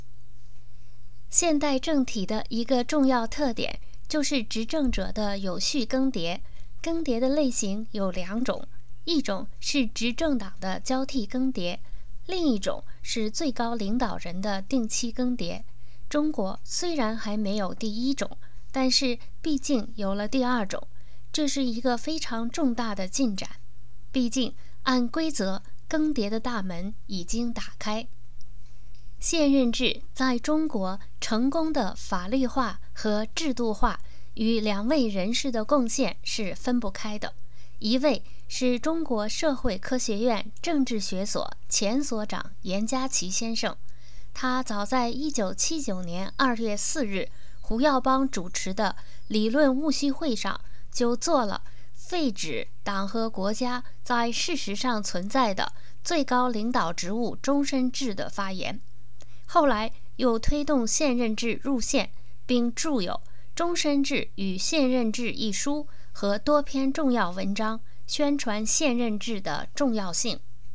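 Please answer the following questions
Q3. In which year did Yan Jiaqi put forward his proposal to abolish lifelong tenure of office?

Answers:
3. 1979

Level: M.Phil Year 2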